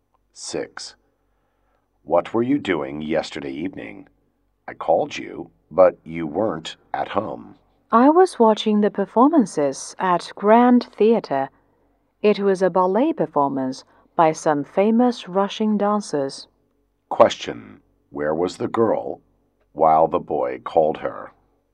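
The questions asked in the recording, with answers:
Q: Where was the girl while the boy called her?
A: At the Grand Theatre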